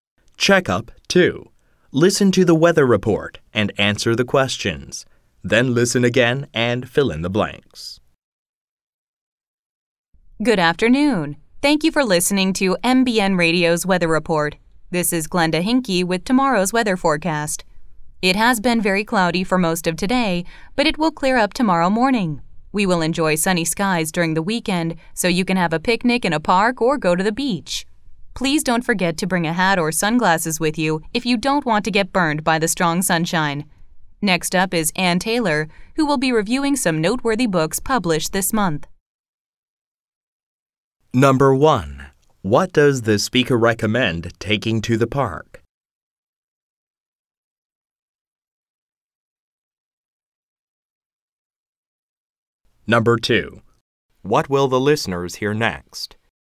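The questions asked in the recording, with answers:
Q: What does the speaker recommend taking to the park?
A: A hat or sunglasses

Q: What will the listeners hear next?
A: Book reviews by Ann Taylor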